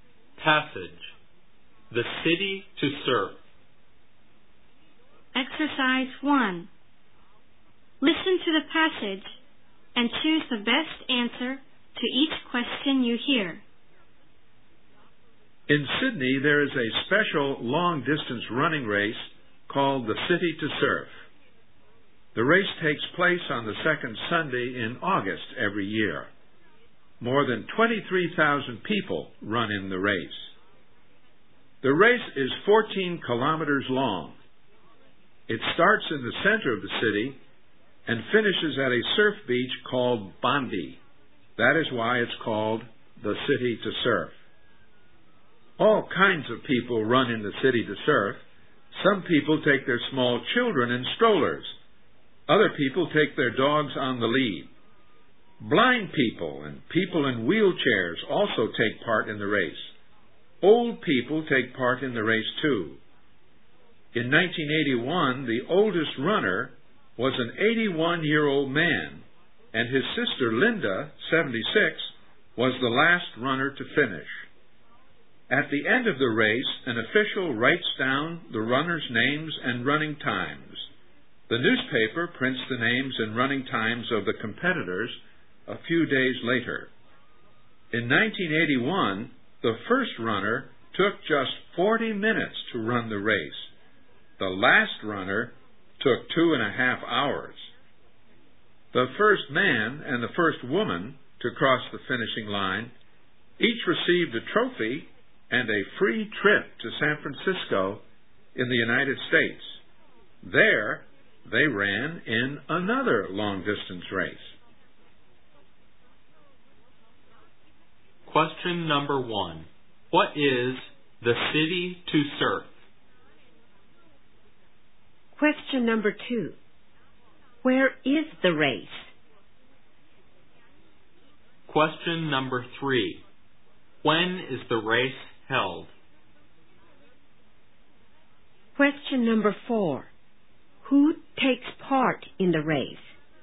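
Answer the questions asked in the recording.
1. A long-distance running race
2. In Sydney
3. On the second Sunday in August every year
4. All kinds of people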